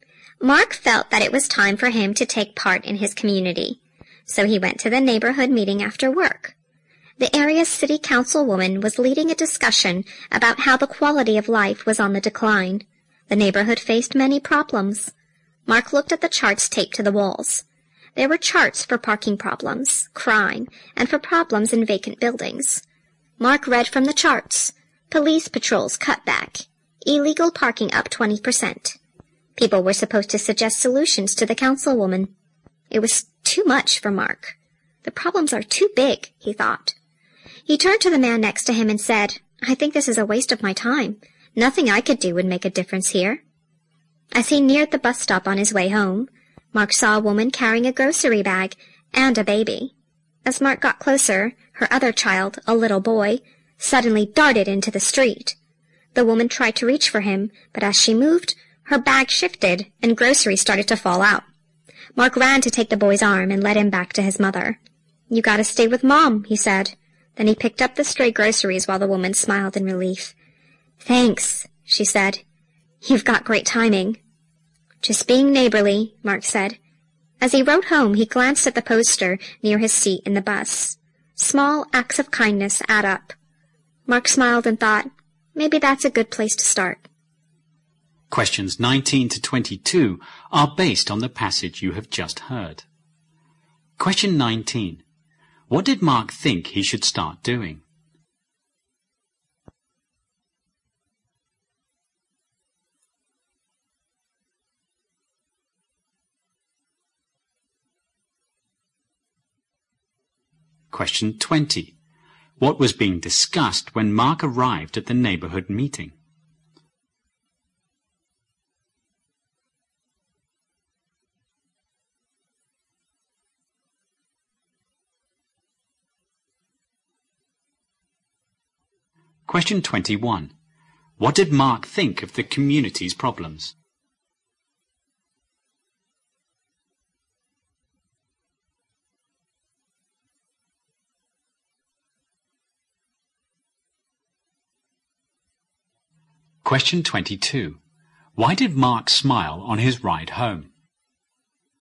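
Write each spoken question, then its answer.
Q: What did Mark think he should start doing?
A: Taking part in his community

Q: What was being discussed when Mark arrived at the neighborhood meeting?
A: How the quality of life was on the decline

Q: What did Mark think of the community's problems?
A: They were too big for him to make a difference

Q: Why did Mark smile on his ride home?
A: He realized small acts of kindness add up and were a good place to start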